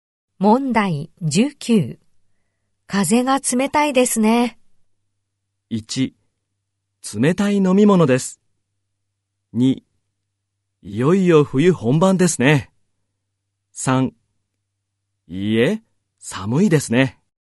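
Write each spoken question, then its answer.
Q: 風が冷たいですね。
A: 2: いよいよ冬本番ですね。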